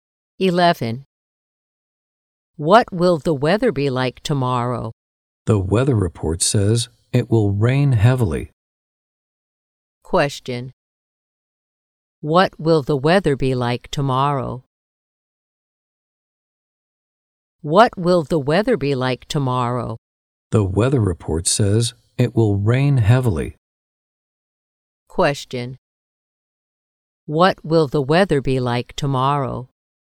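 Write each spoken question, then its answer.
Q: What will the weather be like tomorrow?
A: It will rain heavily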